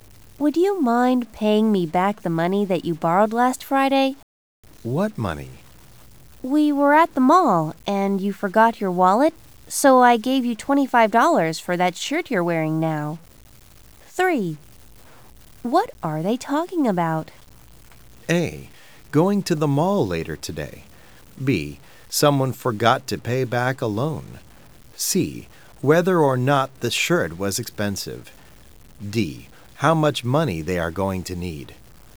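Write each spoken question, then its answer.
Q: What are they talking about?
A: B: Someone forgot to pay back a loan.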